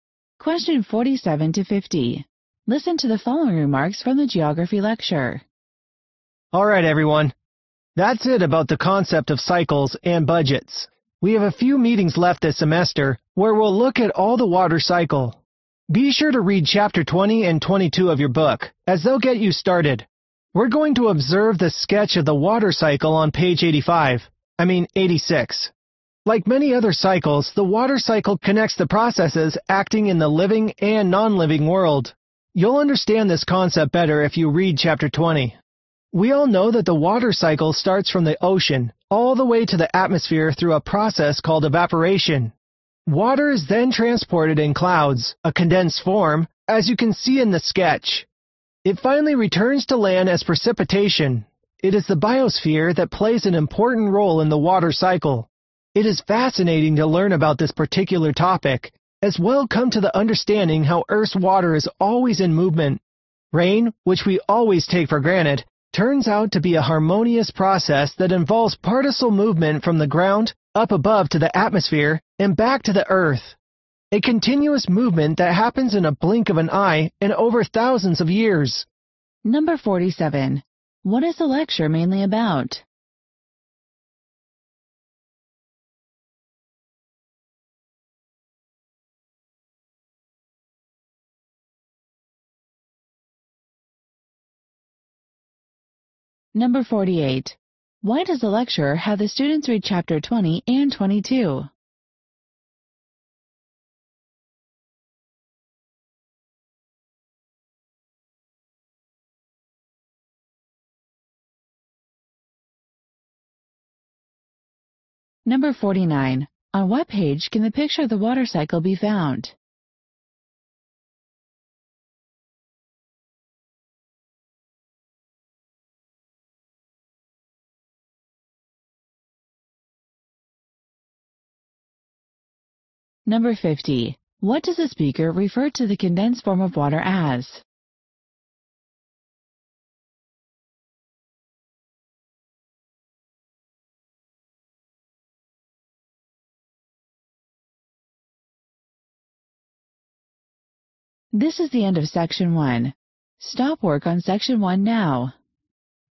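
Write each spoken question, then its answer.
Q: What is the lecture mainly about?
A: The water cycle

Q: Why does the lecturer have the students read chapter 20 and 22?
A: To get them started on the water cycle

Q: On what page can the picture of the water cycle be found?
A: Page 86

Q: What does the speaker refer to the condensed form of water as?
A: Clouds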